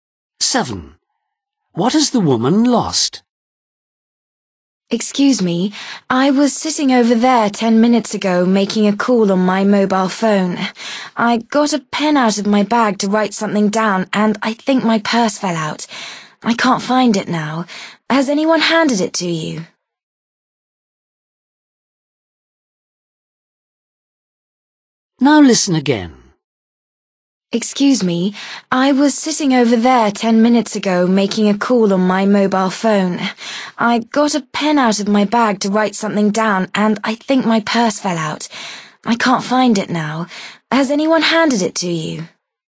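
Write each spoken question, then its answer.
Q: What has the woman lost?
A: her purse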